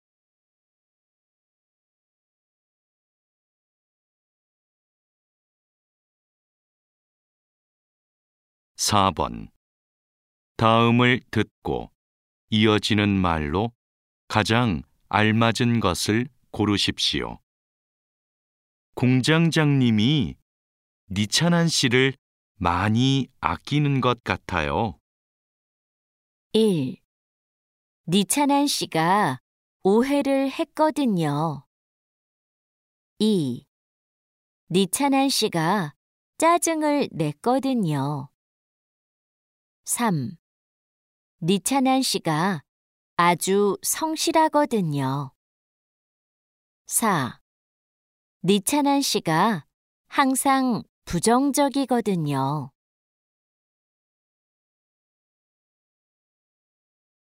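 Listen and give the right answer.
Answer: 3: 니찬한 씨가 아주 성실하거든요.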